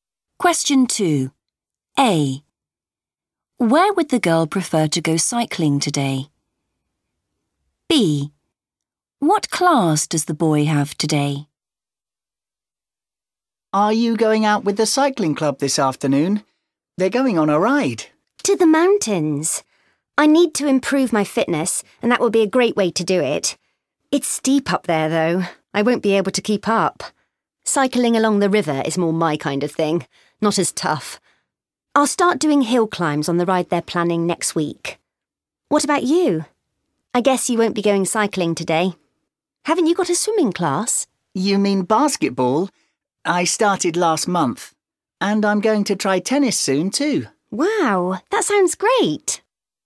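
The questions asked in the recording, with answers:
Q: Where would the girl prefer to go cycling today?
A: along the river

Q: What class does the boy have today?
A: basketball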